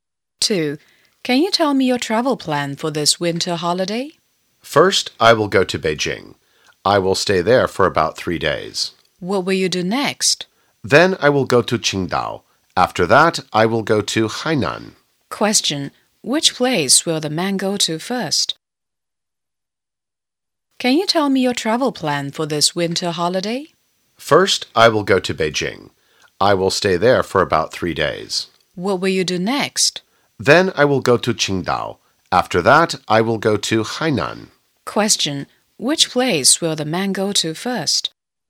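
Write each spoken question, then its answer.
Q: Question, which place will the man go to first?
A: Beijing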